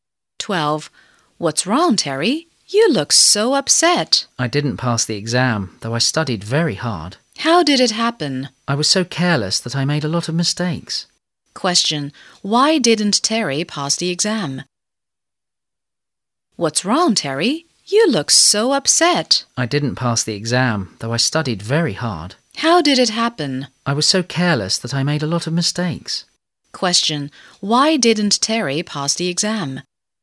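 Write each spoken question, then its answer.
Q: Question. Why didn't Terry pass the exam?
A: He was careless and made a lot of mistakes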